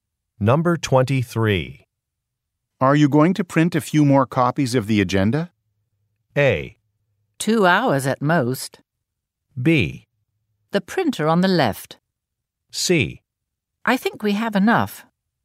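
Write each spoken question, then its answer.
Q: Are you going to print a few more copies of the agenda?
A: C: I think we have enough.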